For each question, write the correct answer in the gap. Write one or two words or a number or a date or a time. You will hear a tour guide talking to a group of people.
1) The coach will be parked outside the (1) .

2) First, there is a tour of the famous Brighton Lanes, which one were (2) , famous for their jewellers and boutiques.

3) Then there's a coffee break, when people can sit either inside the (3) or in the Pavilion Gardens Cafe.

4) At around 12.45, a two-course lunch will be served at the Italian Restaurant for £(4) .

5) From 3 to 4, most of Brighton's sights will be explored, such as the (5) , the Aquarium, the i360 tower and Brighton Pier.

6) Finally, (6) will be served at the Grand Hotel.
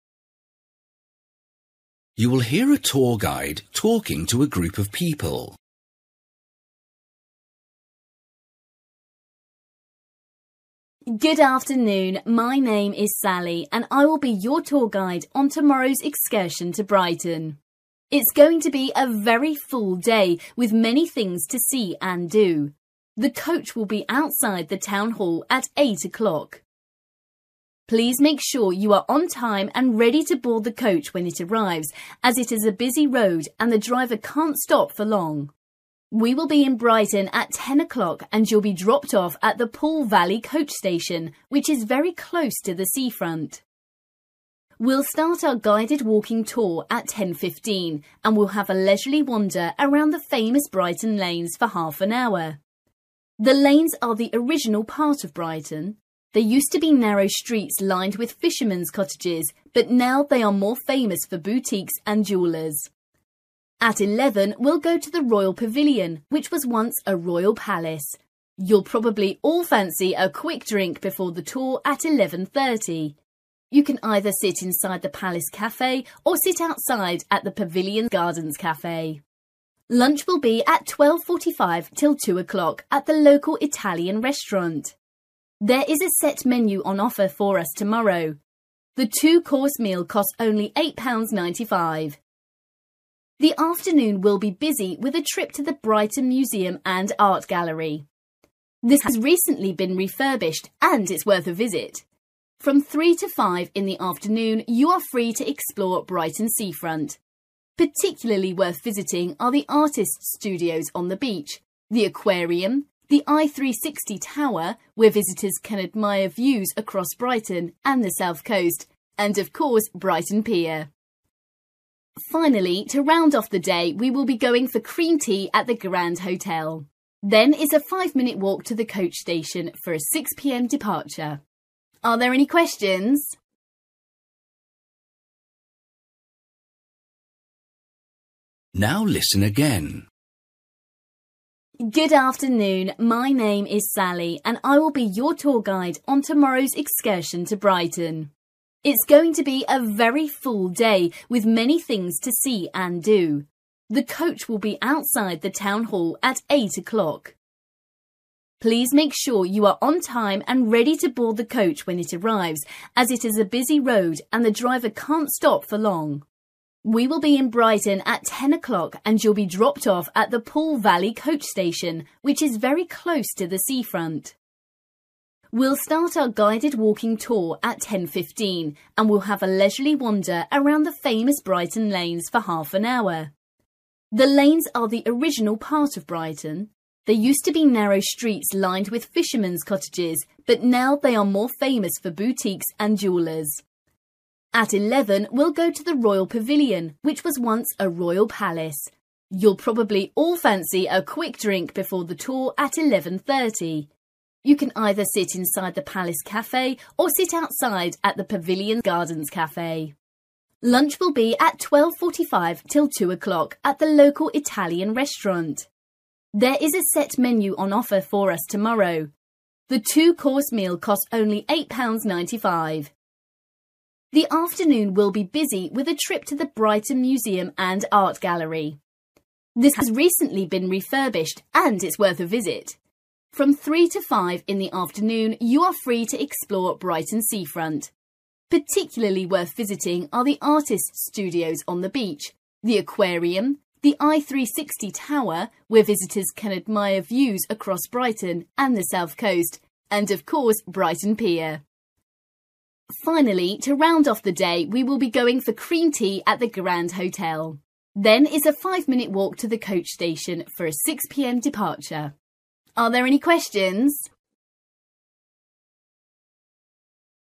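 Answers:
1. town hall
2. fishermen's cottages
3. Palace Cafe
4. 8.95
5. artists' studios
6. cream tea

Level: Luyện nghe trình độ B1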